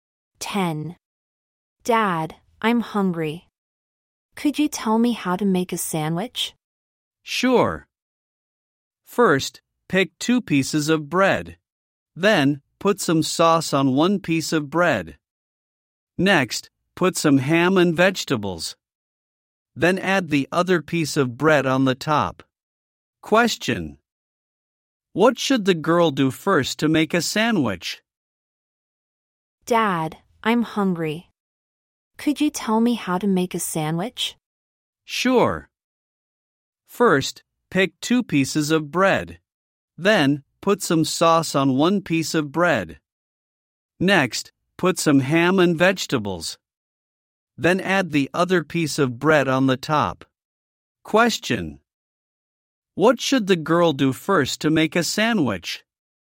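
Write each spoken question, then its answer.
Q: What should the girl do first to make a sandwich?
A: Pick 2 pieces of bread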